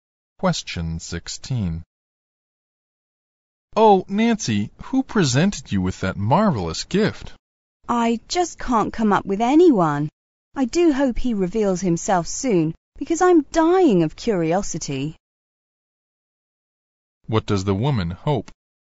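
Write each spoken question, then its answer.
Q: What does the woman hope?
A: That the person who gave the gift will reveal himself soon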